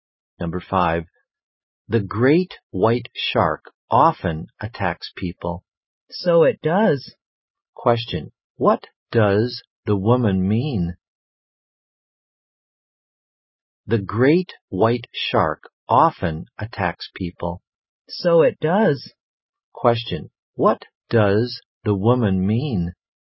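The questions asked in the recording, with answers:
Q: What does the woman mean?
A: She agrees that the great white shark often attacks people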